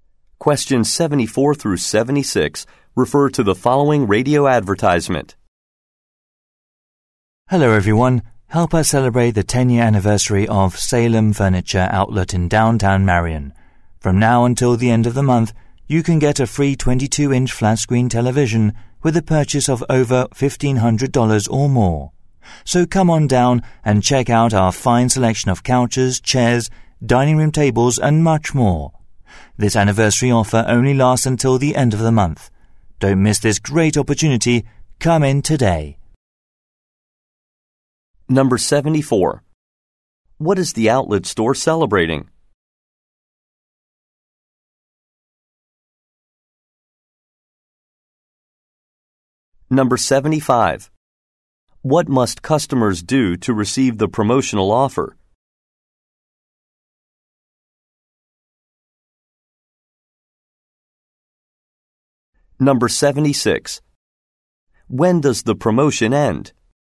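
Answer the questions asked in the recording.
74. Its 10-year anniversary
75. Make a purchase of over $1,500
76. At the end of the month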